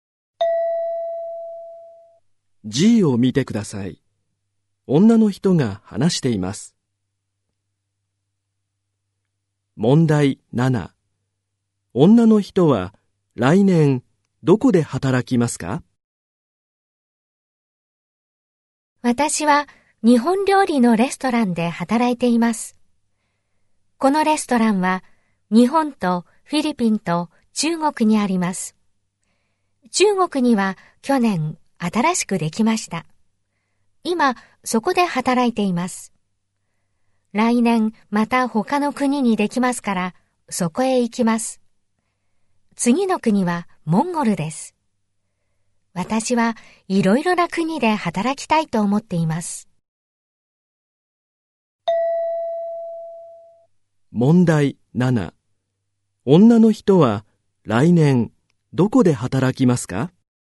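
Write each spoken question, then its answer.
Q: 女の人は来年どこで働きますか?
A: モンゴル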